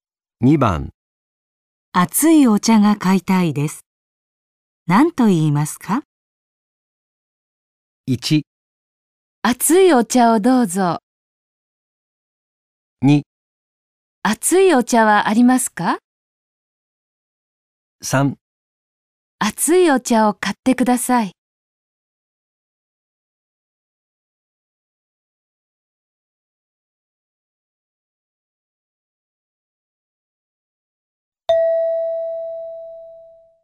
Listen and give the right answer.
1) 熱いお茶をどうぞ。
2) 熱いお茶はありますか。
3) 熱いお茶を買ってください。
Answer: 2) 熱いお茶はありますか。

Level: N5 Listening · Test 3